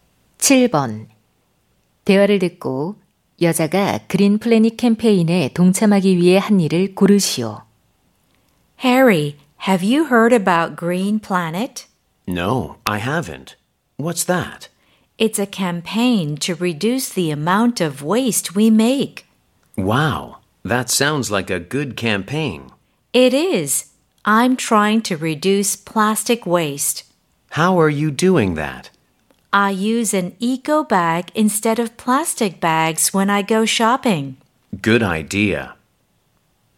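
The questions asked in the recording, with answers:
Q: 여자가 그린 플래닛 캠페인에 동참하기 위해 한 일을 고르시오.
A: 쇼핑할 때 비닐봉지 대신 에코백 사용하기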